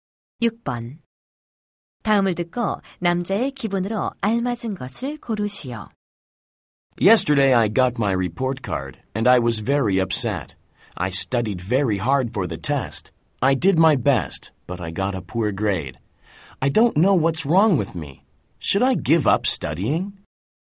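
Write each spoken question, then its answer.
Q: 다음을 듣고 남자의 기분으로 알맞은 것을 고르시오.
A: 속상함(실망함)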